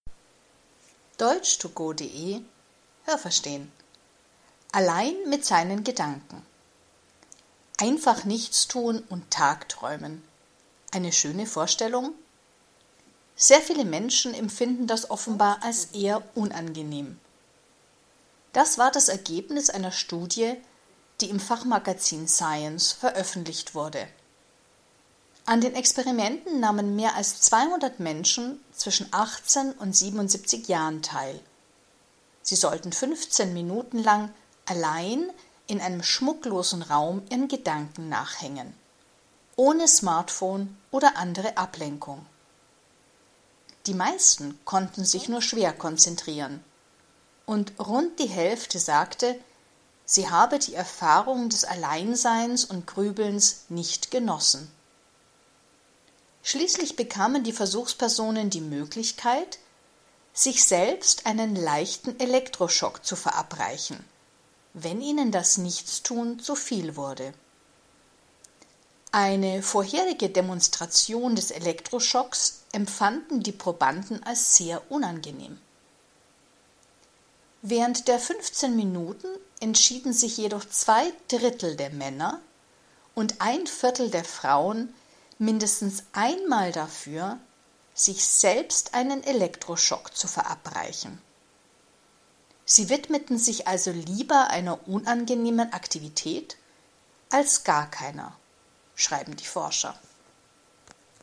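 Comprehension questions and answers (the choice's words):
Was haben Sie gehört? Es gibt nur eine korrekte Antwort.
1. Das Nichtstun ist für sehr viele Menschen ...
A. angenehm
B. unangenehm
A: unangenehm

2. An den Experimenten haben _____ teilgenommen.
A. 200 Männer zwischen 18 und 77 Jahren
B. Personen zwischen 18 und 77 Jahren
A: Personen zwischen 18 und 77 Jahren

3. Die Personen waren 15 Minuten _____ in einem Raum.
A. allein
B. mit 200 anderen Menschen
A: allein

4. Die Personen ...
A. durften nichts machen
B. mussten den Raum schmücken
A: durften nichts machen

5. Wer sich beim Nichtstun langweilte, konnte ...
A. sich selbst einen Elektroschock verabreichen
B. anderen einen Elektroschock verabreichen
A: sich selbst einen Elektroschock verabreichen

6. Wussten die Versuchspersonen vor dem Experiment, wie weh ein Elektroschock tut?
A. Nein, man sagte ihnen das nicht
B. Ja, sie konnten den Elektroschock ausprobieren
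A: Ja, sie konnten den Elektroschock ausprobieren

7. Wie viele Versuchspersonen wollten sich lieber einen Elektroschock verabreichen, als nichts zu tun?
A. ein Viertel der Männer und ein Drittel der Frauen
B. zwei Drittel der Männer und ein Viertel der Frauen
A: zwei Drittel der Männer und ein Viertel der Frauen

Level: B1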